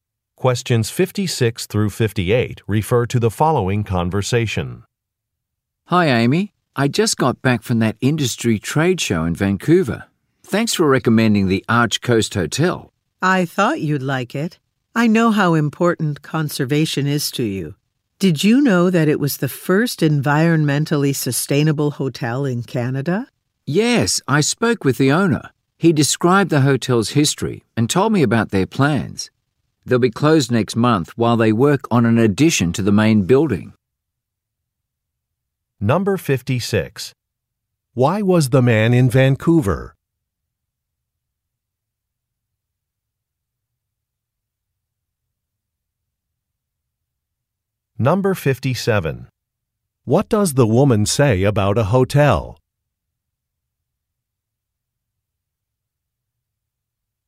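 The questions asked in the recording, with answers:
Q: Why was the man in Vancouver?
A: To attend an industry trade show

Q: What does the woman say about a hotel?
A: It was Canada's first environmentally sustainable hotel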